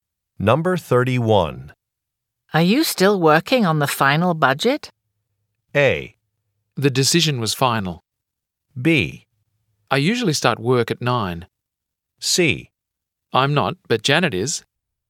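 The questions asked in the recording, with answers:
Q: Are you still working on the final budget?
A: C: I'm not, but Janet is.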